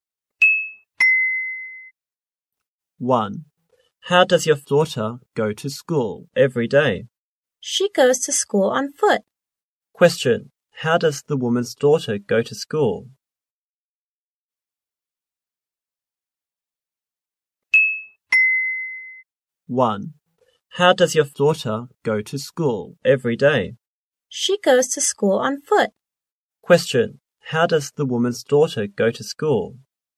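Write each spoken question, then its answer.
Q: Question. How does the woman's daughter go to school?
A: On foot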